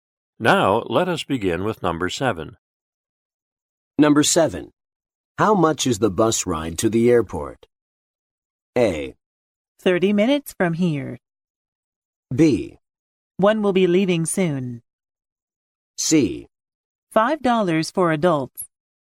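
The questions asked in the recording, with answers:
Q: How much is the bus ride to the airport?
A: C: $5 for adults.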